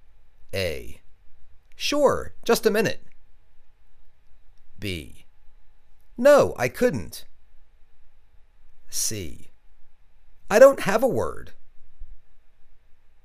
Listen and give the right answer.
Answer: Sure, just a minute.